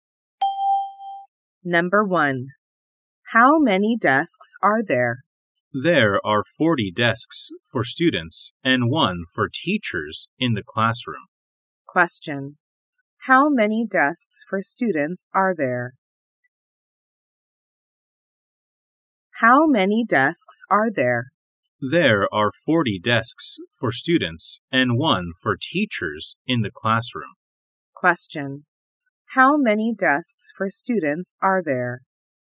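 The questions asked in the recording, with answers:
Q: How many desks for students are there?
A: 40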